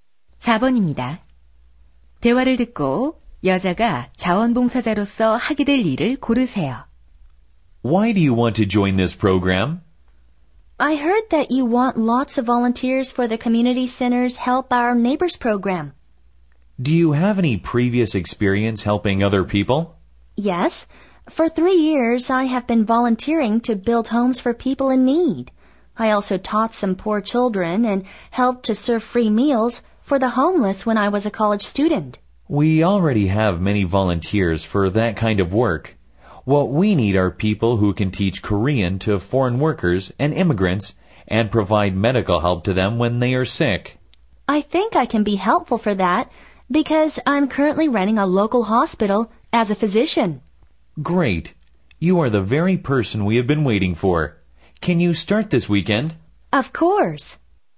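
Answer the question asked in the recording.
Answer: 외국인 노동자와 이민자에게 한국어를 가르치고 의료 지원하기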